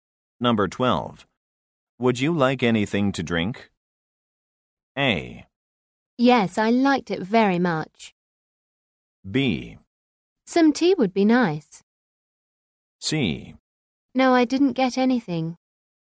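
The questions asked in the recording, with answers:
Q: Would you like anything to drink?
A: B: Some tea would be nice.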